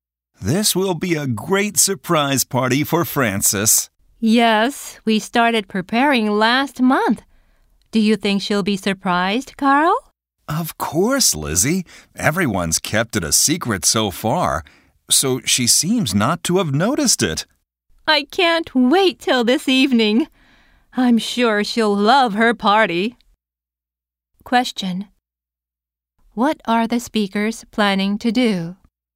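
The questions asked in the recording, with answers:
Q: What are the speakers planning to do?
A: Have a surprise party for Frances.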